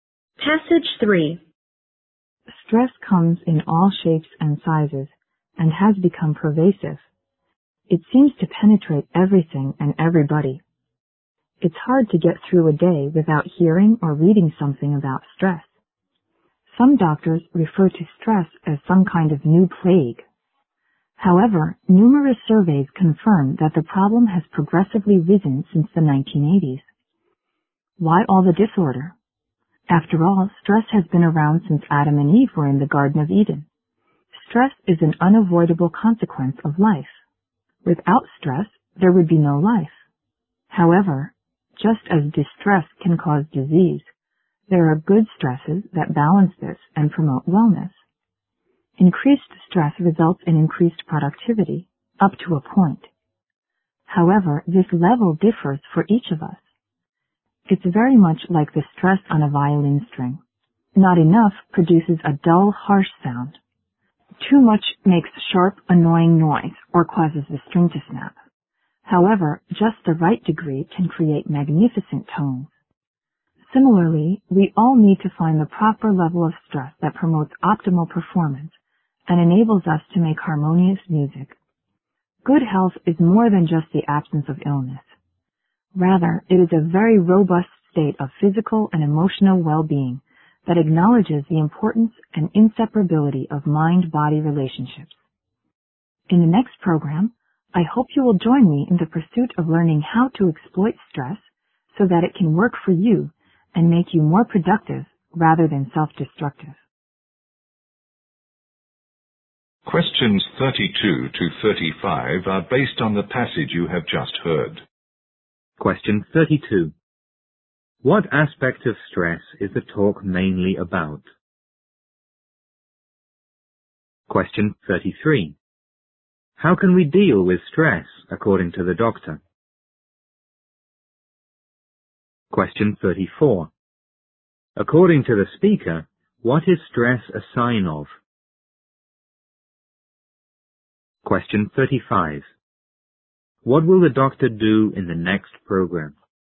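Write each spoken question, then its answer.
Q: How can we deal with stress, according to the doctor?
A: By finding the proper level of stress for ourselves

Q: What will the doctor do in the next program?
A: Explain how to exploit stress so that it makes us more productive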